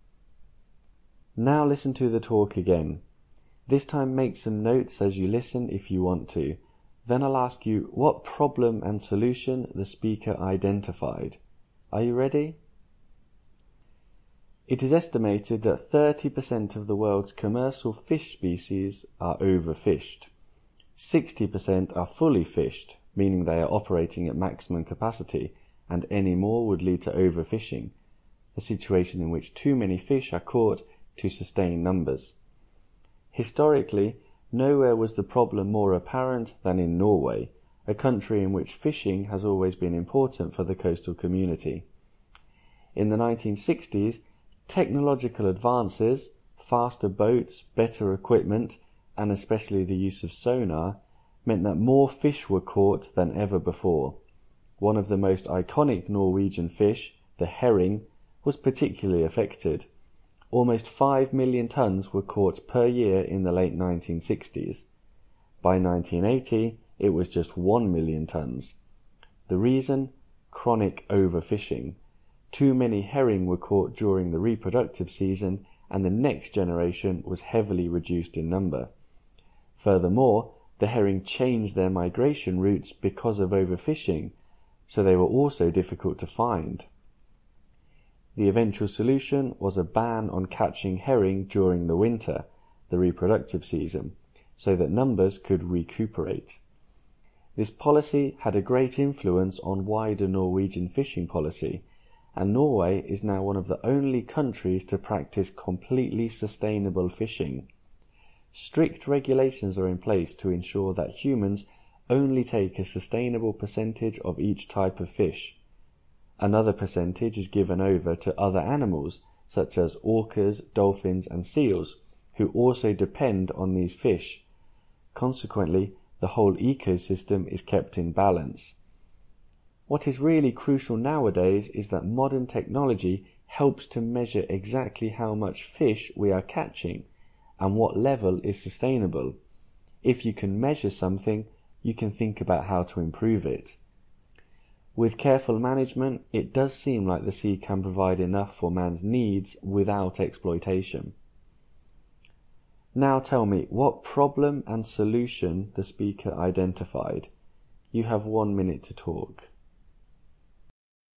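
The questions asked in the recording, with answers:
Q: Now tell me, what problem and solution the speaker identified?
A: Problem: overfishing of herring in Norway (catch fell from about 5 million tons to 1 million tons). Solution: a ban on catching herring in winter (the breeding season), then strict sustainable quotas that use technology to measure catches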